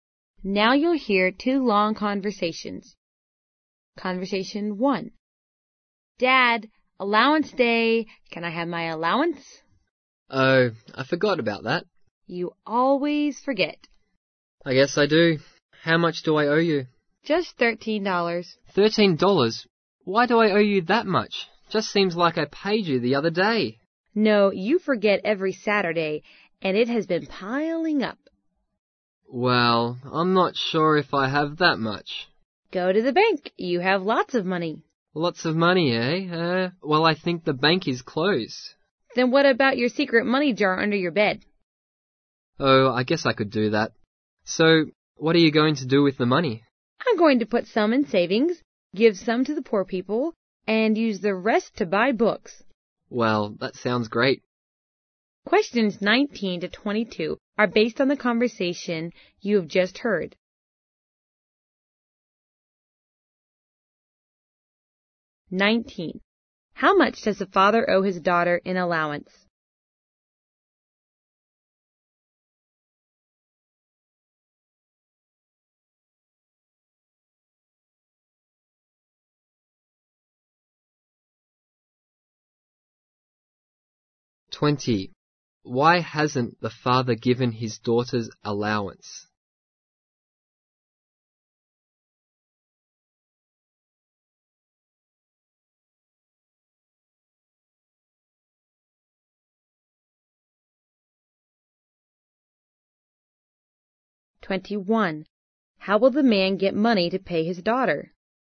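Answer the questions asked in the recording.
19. $13
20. He forgets every Saturday
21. From his secret money jar under his bed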